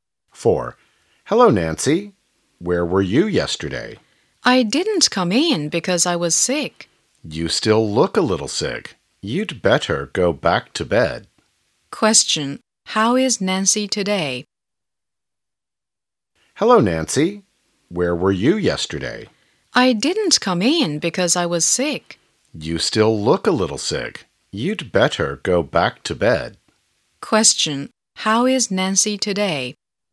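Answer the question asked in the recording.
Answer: She still looks a little sick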